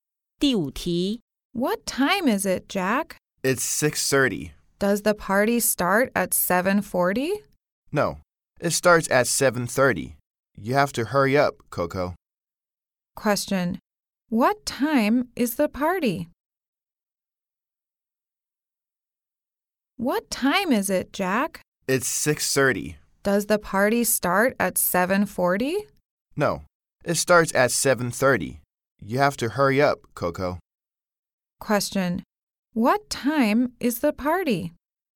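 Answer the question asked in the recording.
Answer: 7:30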